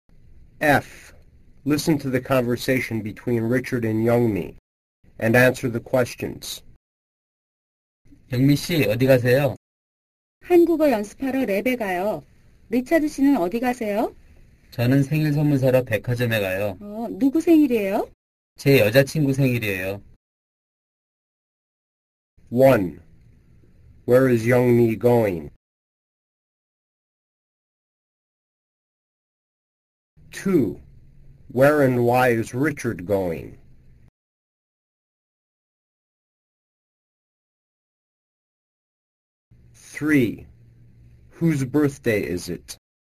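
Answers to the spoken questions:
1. To the lab to practice Korean
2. To the department store to buy a birthday present
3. Richard's girlfriend's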